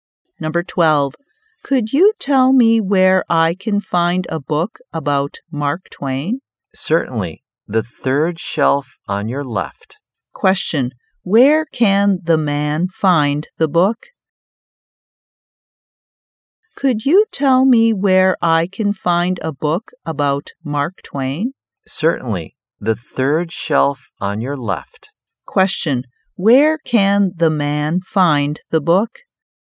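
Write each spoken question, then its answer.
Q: Question. Where can the man find the book?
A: On the third shelf on his left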